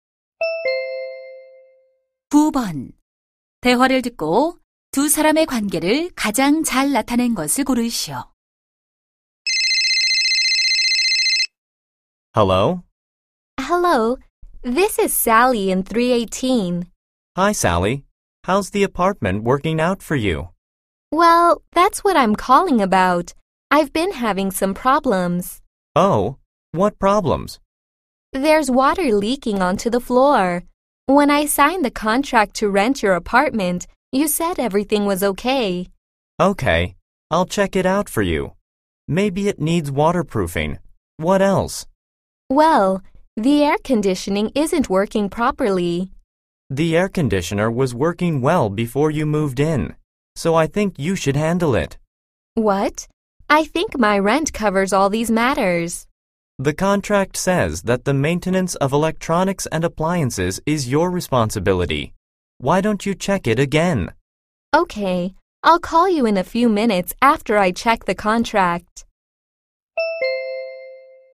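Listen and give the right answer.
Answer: 세입자 - 집주인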